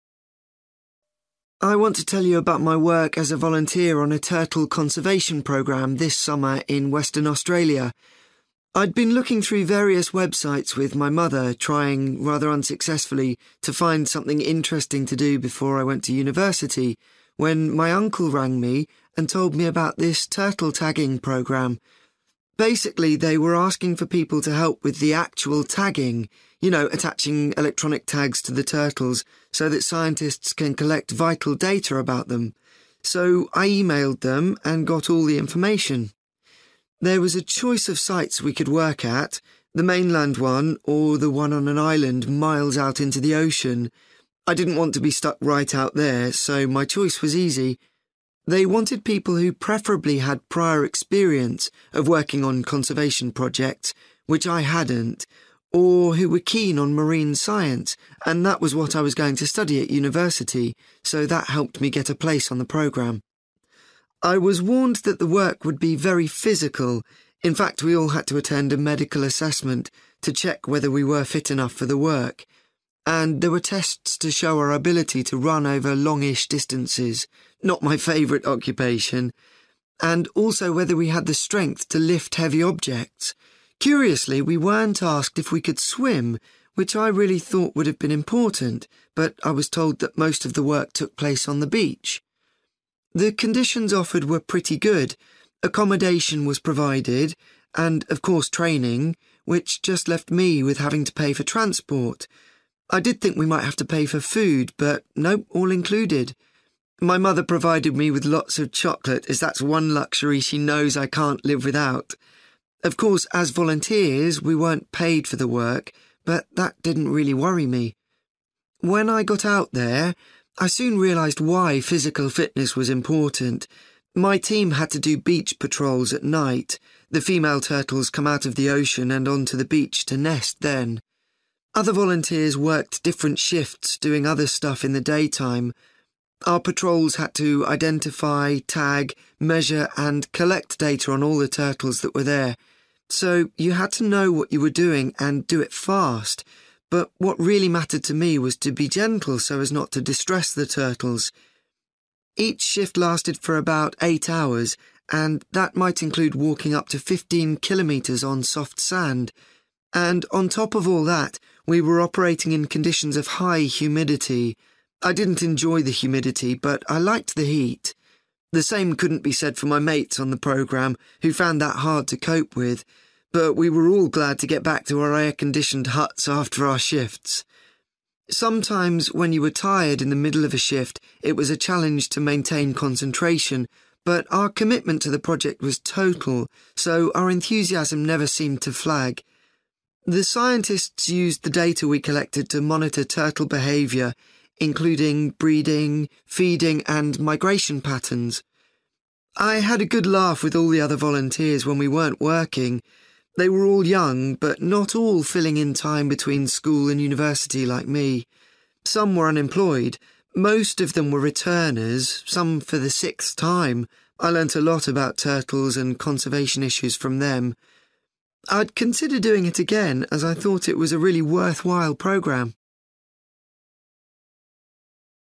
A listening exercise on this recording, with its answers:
For questions 9-18, complete the sentences with a word or short phrase.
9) David first found out about the turtle programme from his (9) .......................................... .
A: uncle

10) David chose to work at the (10) .......................................... site because its location was more convenient.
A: main(-)land

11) David things his interest in (11) .......................................... helped him to get a place on the programme.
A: marine science

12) David was surprised to find that the ability to (12) .......................................... wasn't considered necessary.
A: swim

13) Apart from the cost of (13) .......................................... everything essential was provided by the organisers.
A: (the) transport

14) David's shifts took place during the (14) .......................................... when the turtles could be checked on the beach.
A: night

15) David felt it was particularly important to be (15) .......................................... when handling the turtles.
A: gentle

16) Unlike his fellow volunteers, David found the (16) .......................................... didn't bother him.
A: heat

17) David said that tiredness could lead to a loss of (17) .......................................... among the volunteers when they were collecting data.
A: concentration

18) David uses the name (18) .......................................... to refer to the most experienced volunteers.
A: returners

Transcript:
I want to tell you about my work as a volunteer on a turtle conservation programme this summer in Western Australia.
I'd been looking through various websites with my mother, trying, rather unsuccessfully, to find something interesting to do before I went to university when my uncle rang me and told me about this turtle tagging programme. Basically, they were asking for people to help with the actual tagging – you know, attaching electronic tags to the turtles so that scientists can collect vital data about them. So I emailed them and got all the information.
There was a choice of sites we could work at – the mainland one or the one on an island miles out into the ocean. I didn't want to be stuck right out there so my choice was easy. They wanted people who preferably had prior experience of working on conservation projects – which I hadn't – or who were keen on marine science, and that was what I was going to study at university. So that helped me get a place on the programme.
I was warned that the work would be very physical – in fact we all had to attend a medical assessment to check whether we were fit enough for the work. And there were tests to show our ability to run over longish distances – not my favourite occupation – and also whether we had the strength to lift heavy objects. Curiously, we weren't asked if we could swim, which I really thought would have been important, but I was told that most of the work took place on the beach.
The conditions offered were pretty good. Accommodation was provided and of course training, which just left me with having to pay for transport. I did think we might have to pay for food but no, all included. My mother provided me with lots of chocolate as that's one luxury she knows I can't live without. Of course, as volunteers we weren't paid for the work but that didn't really worry me.
When I got out there, I soon realised why physical fitness was important. My team had to do beach patrols at night – the female turtles come out of the ocean and on to the beach to nest then. Other volunteers worked different shifts doing other stuff in the daytime. Our patrols had to identify, tag, measure and collect data on all the turtles that were there. So you had to know what you were doing and do it fast, but what really mattered to me was to be gentle so as not to distress the turtles. Each shift lasted for about 8 hours and that might include walking up to 15 kilometres on soft sand. And on top of all that, we were operating in conditions of high humidity. I didn't enjoy the humidity but I liked the heat. The same couldn't be said for my mates on the programme, who found that hard to cope with. But we were all glad to get back to our air-conditioned huts after our shifts.
Sometimes when you were tired in the middle of a shift, it was a challenge to maintain concentration but our commitment to the project was total so our enthusiasm never seemed to flag. The scientists used the data we collected to monitor turtle behaviour, including breeding, feeding and migration patterns.
I had a good laugh with all the other volunteers when we weren't working. They were all young, but not all filling in time between school and university like me ... some were unemployed. Most of them were returners, some for the sixth time. I learnt a lot about turtles and conservation issues from them. I'd consider doing it again as I thought it was a really worthwhile programme.

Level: B2